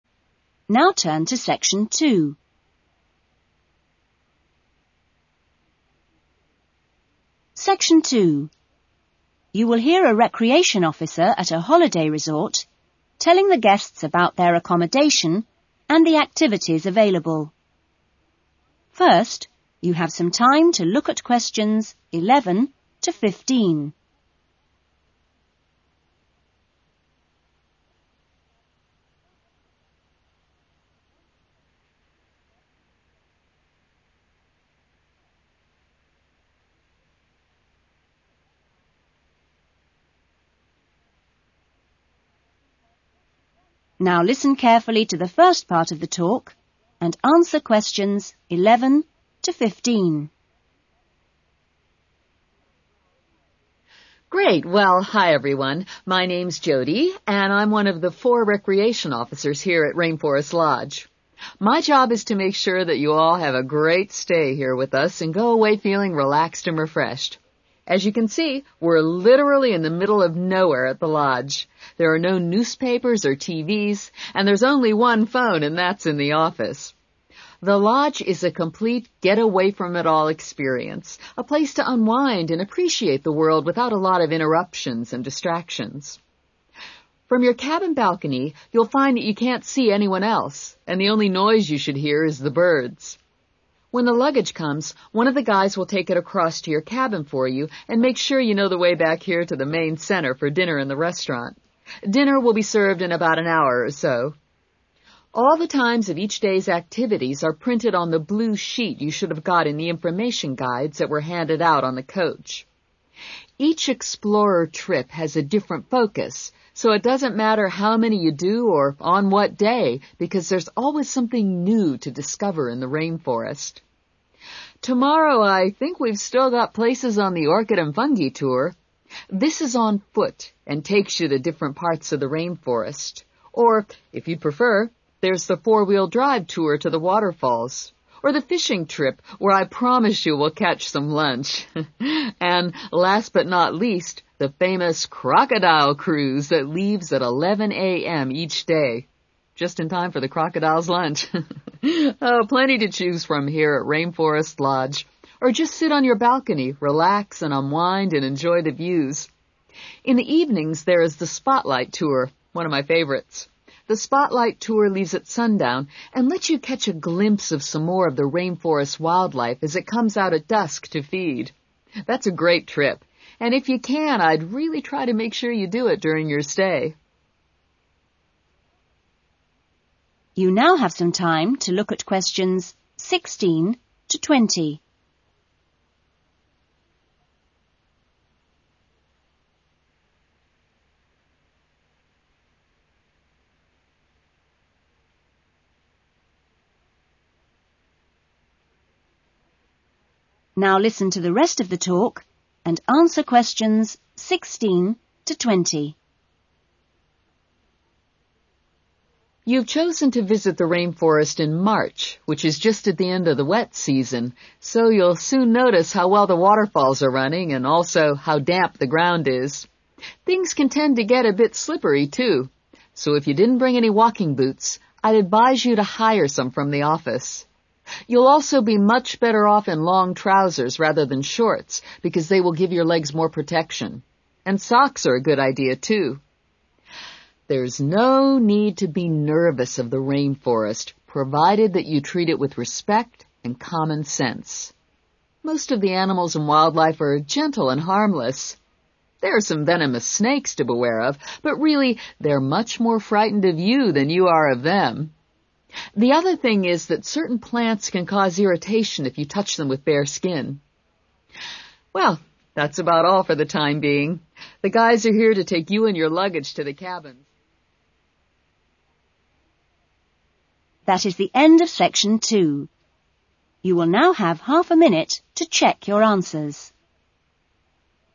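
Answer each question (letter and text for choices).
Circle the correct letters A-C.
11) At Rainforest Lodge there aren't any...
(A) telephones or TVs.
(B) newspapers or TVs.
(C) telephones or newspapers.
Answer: (B) newspapers or TVs.

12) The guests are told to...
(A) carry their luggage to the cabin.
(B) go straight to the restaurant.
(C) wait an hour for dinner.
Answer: (C) wait an hour for dinner.

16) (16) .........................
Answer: walking boots

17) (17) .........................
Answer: long trousers

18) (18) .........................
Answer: socks

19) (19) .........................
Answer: venomous snakes

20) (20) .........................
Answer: certain plants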